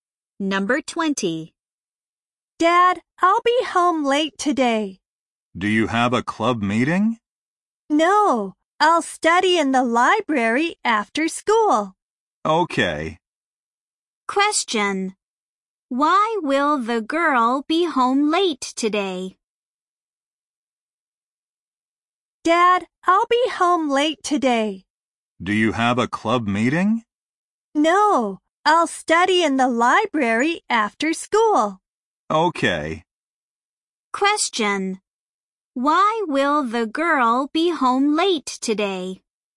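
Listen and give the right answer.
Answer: She will study in the library after school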